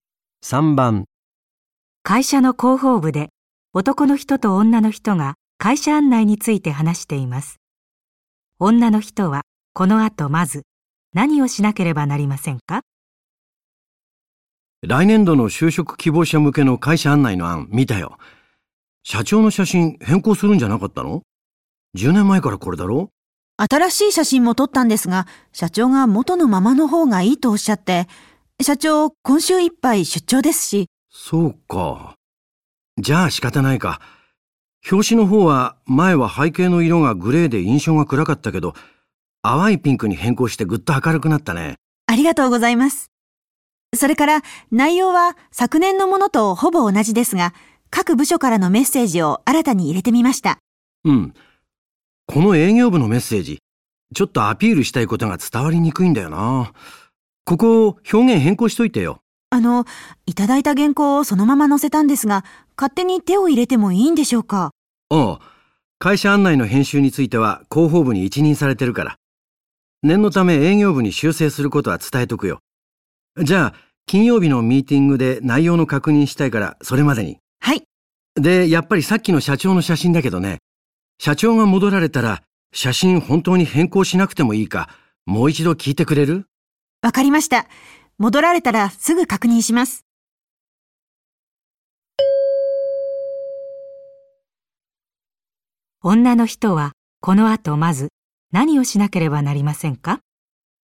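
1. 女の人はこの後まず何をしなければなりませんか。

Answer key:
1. 営業部のメッセージの表現を変更する

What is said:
会社の広報部で男の人と女の人が会社案内について話しています。女の人はこの後まず何をしなければなりませんか。
男: 来年度の就職希望者向けの会社案内の案、見たよ。社長の写真変更するんじゃなかったの?十年前からこれだろう?
女:新しい写真も撮ったんですが、社長がもとのままのほうがいいとおしゃって、社長今週いっぱい出張ですし。
男:そうか。じゃあ、しかたないか。表紙の方は前は背景の色がグレーで印象が暗かったけど、淡いピンクに変更してぐっと明るくなったね。
女:ありがとうございます。それから内容は昨年のものとほぼ同じですが、各部署からのメッセージを新たに人れてみました。
男:うん、この営業部のメッセージ、ちょっとアピールしたいことが伝わりにくいんだよな。ここ表現変更しといてよ。
女:あのう、いただいた原稿をそのまま載せたんですが、勝手に手を入れてもいいんでしょうか。
男:あ、会社案内の編集については広報部に一任されてるから。念のため、営業部に修正することは伝えとくよ。じゃあ、金曜日のミーテイングで内容の確認したいから、それまでに。
女:はい。
男:で、やっぱりさっきの社長の写真だけどね。社長が戻られたら、写真本当に変更しなくてもいいか、もう一度聞いてくれる?
女:分かりました。戻られたら、すぐ確認します。

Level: N1级别听力题库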